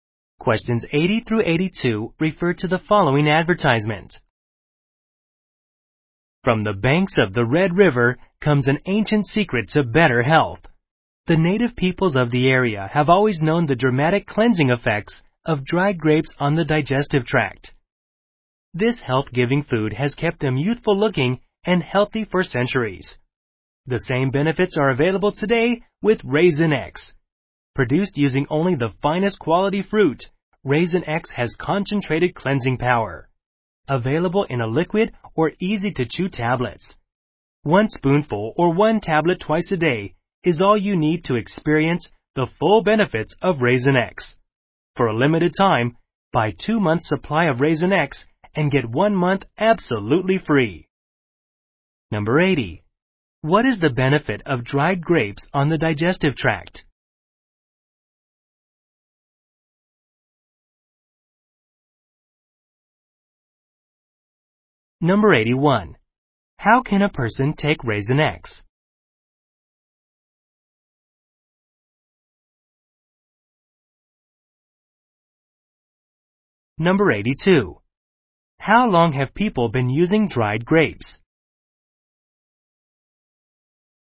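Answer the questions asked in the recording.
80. A cleansing effect
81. As a liquid or chewable tablets
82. For centuries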